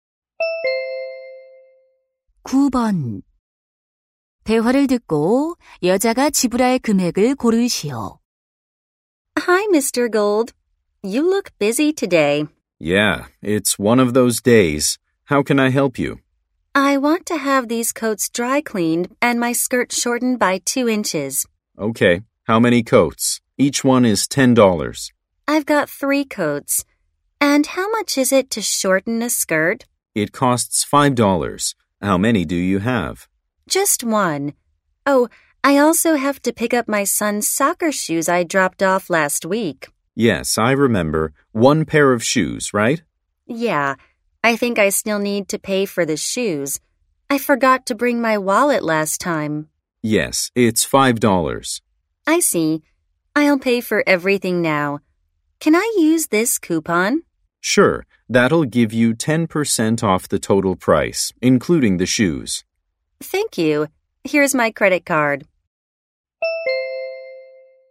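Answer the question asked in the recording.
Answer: $36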